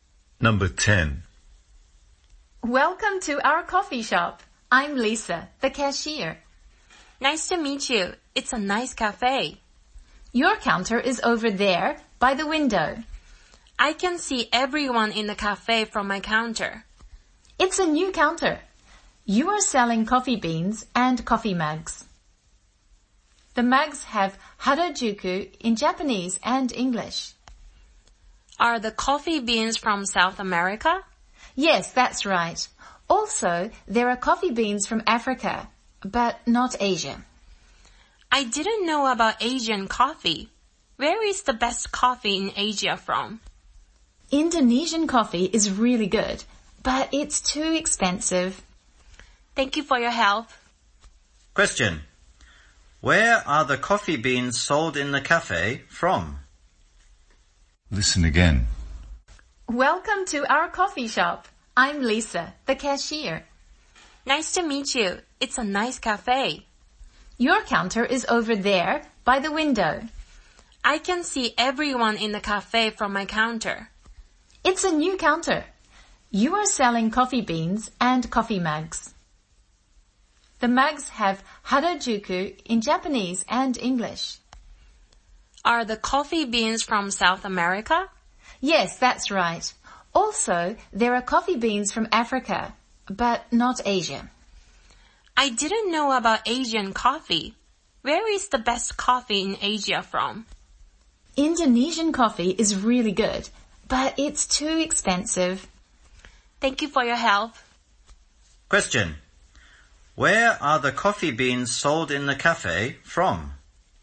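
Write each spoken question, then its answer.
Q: Where are the coffee beans sold in the cafe from?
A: South America and Africa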